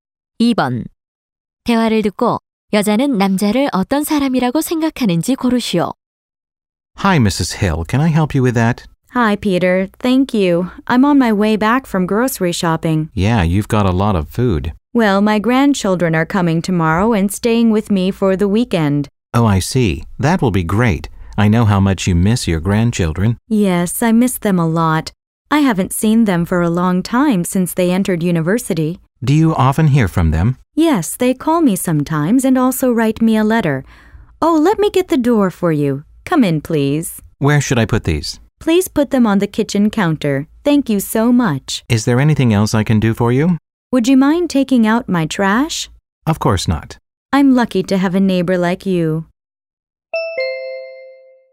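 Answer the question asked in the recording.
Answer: 친절하고 잘 도와주는 이웃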